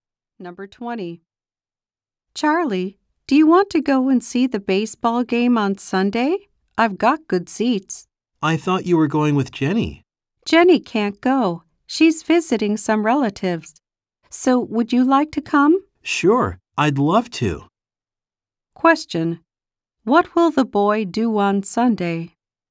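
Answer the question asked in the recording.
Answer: Go to a baseball game.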